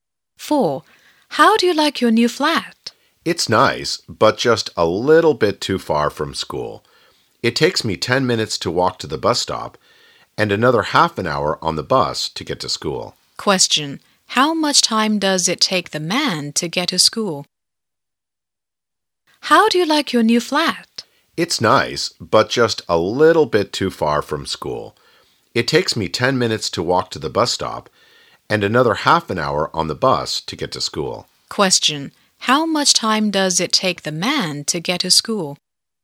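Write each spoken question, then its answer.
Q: How much time does it take the man to get to school?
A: 40 minutes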